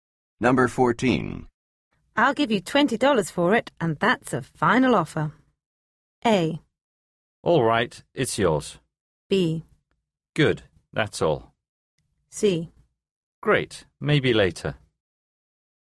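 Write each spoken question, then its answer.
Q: I'll give you $20 for it, and that's a final offer.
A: A: All right, it's yours.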